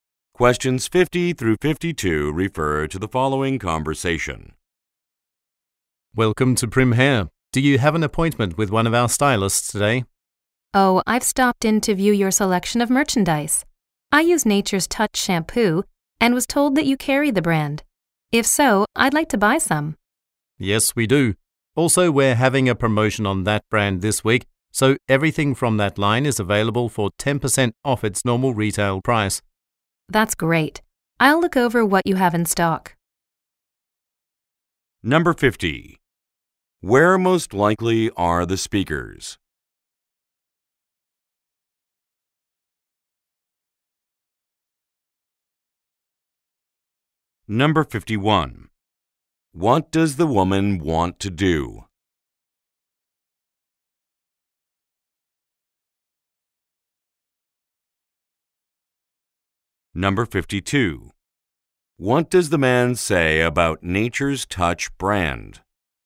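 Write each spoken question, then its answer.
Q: Where most likely are the speakers?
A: At a hair salon

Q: What does the woman want to do?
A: Buy Nature's Touch shampoo

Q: What does the man say about Nature's Touch brand?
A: It is 10% off this week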